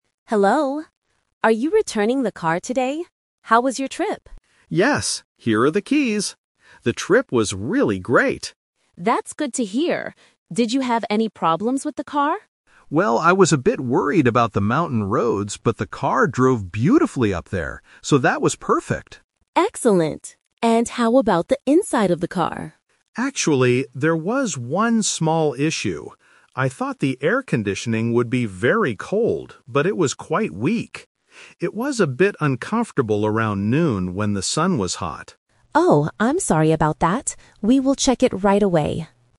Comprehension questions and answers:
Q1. What does the tourist say about driving on the mountain roads?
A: The car drove very well.

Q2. What was the problem inside the car?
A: The air conditioning was weak.

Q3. When did the tourist feel uncomfortable in the car?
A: Around noon.

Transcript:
Agent: Hello! Are you returning the car today? How was your trip?
Tourist: Yes, here are the keys. The trip was really great!
Agent: That's good to hear. Did you have any problems with the car?
Tourist: Well, I was a bit worried about the mountain roads, but the car drove beautifully up there. So that was perfect.
Agent: Excellent. And how about the inside of the car?
Tourist: Actually, there was one small issue. I thought the air conditioning would be very cold, but it was quite weak. It was a bit uncomfortable around noon when the sun was hot.
Agent: Oh, I'm sorry about that. We will check it right away.